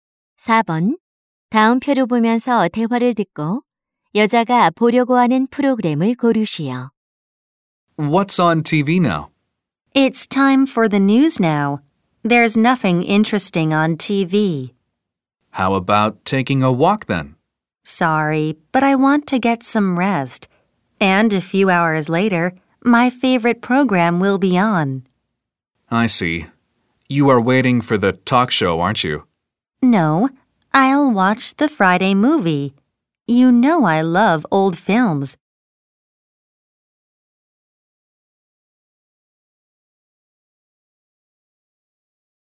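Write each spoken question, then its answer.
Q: 다음 표를 보면서 대화를 듣고 여자가 보려고 하는 프로그램을 고르시오.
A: Friday movie (금요 영화)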